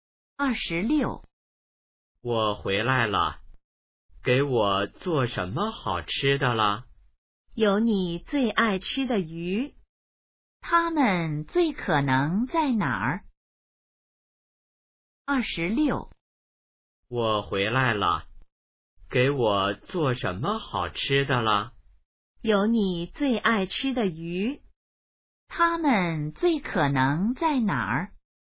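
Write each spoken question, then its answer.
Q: 他们最可能在哪儿?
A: 家里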